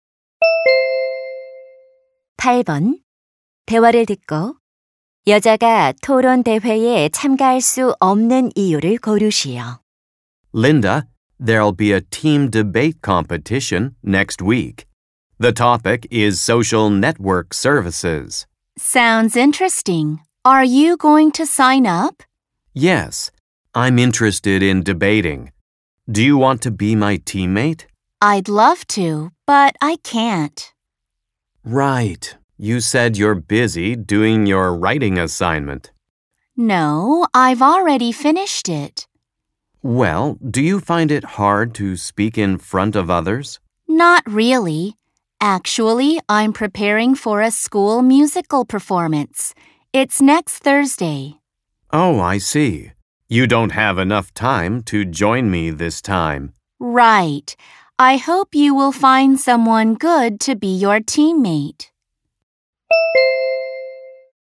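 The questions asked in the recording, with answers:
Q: 대화를 듣고 여자가 토론 대회에 참가할 수 없는 이유를 고르시오.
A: 학교 뮤지컬 공연을 준비해야 해서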